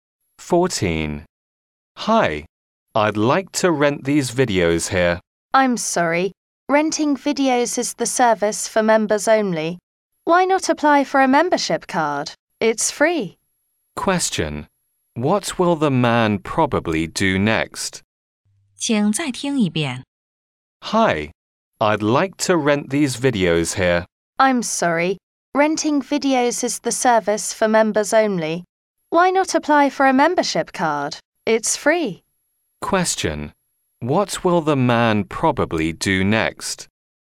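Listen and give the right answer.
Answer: Apply for a membership card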